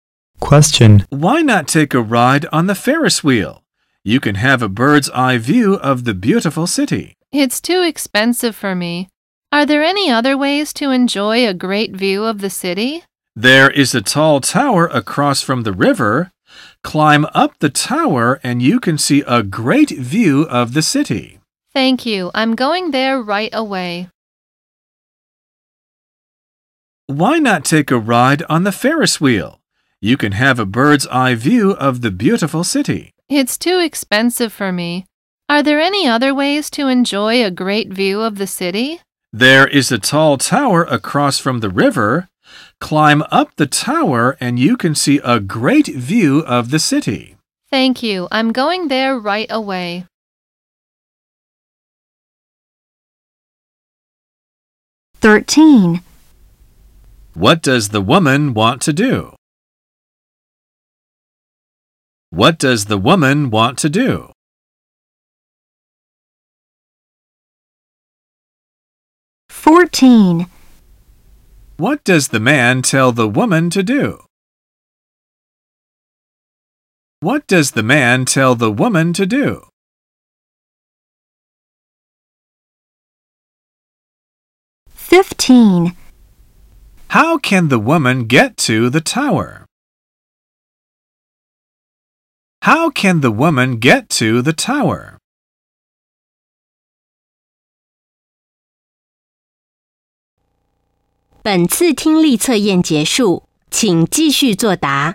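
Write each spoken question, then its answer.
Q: What does the woman want to do?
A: Enjoy a great view of the city

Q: What does the man tell the woman to do?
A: Climb up the tower to see a great view of the city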